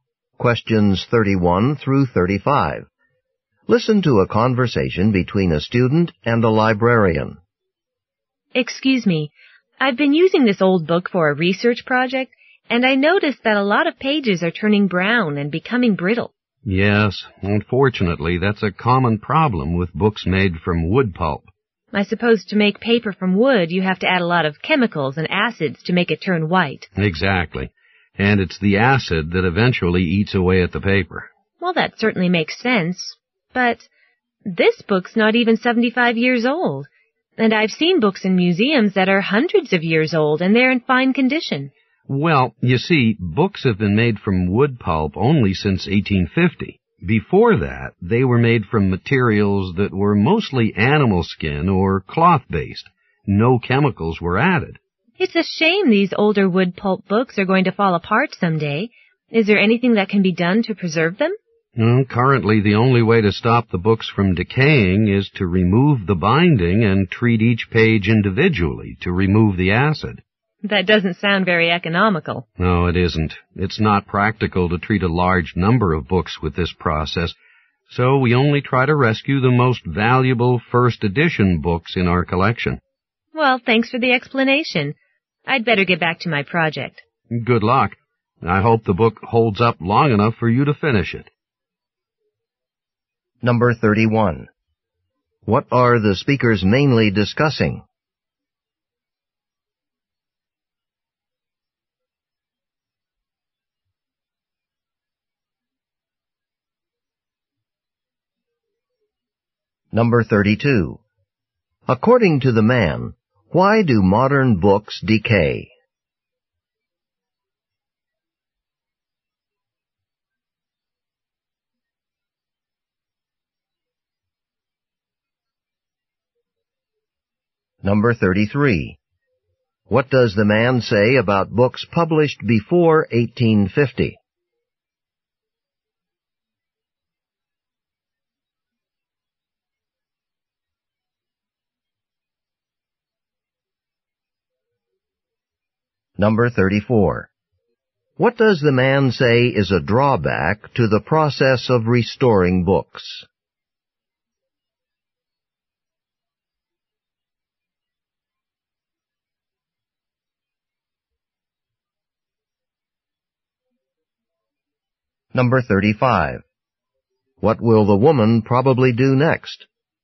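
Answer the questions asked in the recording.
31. Why books made from wood pulp decay, and how they are preserved.
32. The acid in wood-pulp paper eats away at it.
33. They were made mostly from animal skin or cloth, with no chemicals added.
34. It is not economical or practical for large numbers of books.
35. Go back to her research project.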